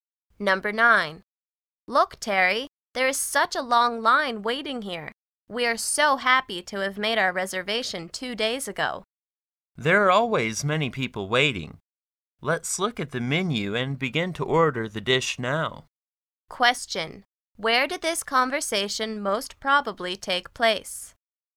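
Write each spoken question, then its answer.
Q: Where did this conversation most probably take place?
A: In a restaurant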